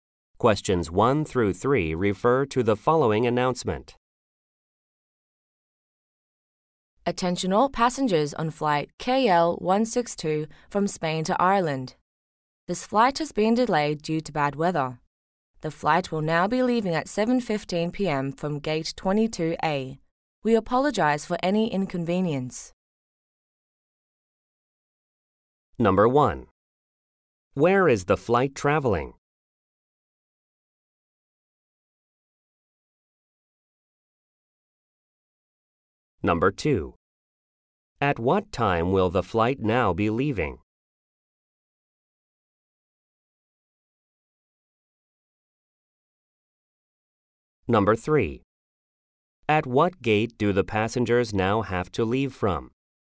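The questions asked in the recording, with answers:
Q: Where is the flight traveling?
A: From Spain to Ireland

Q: At what time will the flight now be leaving?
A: 7:15 p.m.

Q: At what gate do the passengers now have to leave from?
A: Gate 22A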